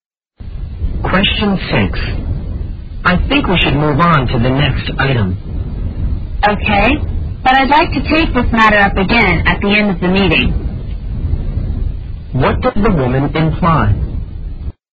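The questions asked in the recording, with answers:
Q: What does the woman imply?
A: She wants to discuss the matter again at the end of the meeting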